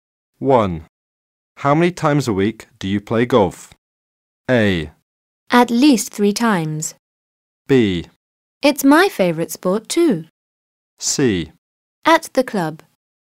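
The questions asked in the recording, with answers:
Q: How many times a week do you play golf?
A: A: At least 3 times.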